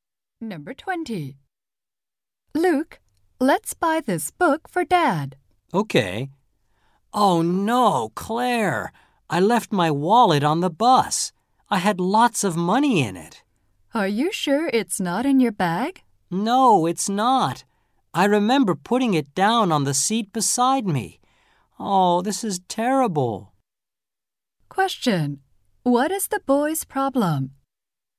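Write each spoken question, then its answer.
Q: Question. What is the boy's problem?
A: He left his wallet on the bus.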